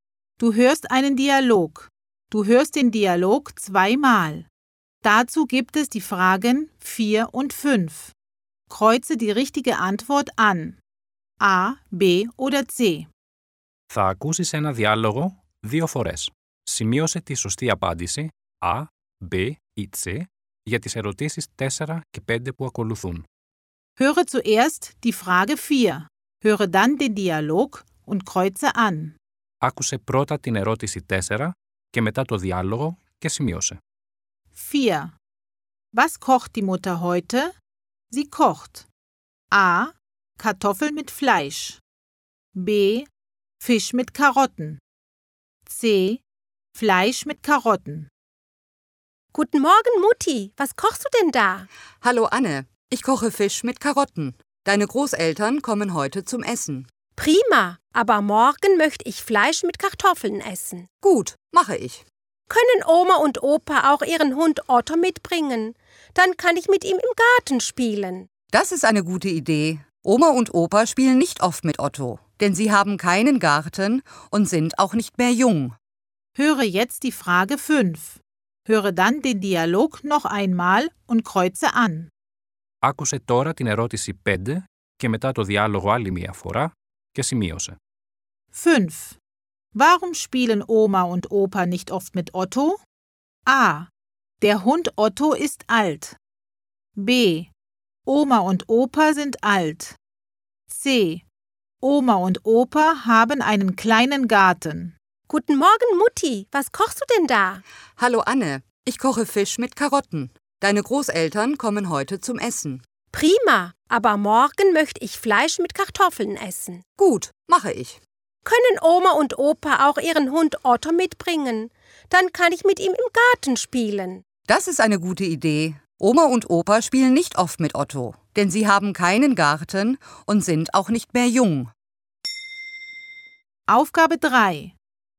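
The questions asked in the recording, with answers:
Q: Was kocht die Mutter heute?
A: B: Fisch mit Karotten

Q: Warum spielen Oma und Opa nicht oft mit Otto?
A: B: Oma und Opa sind alt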